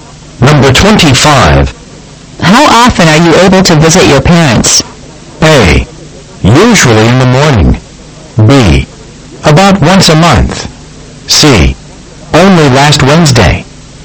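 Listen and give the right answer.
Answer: B: About once a month.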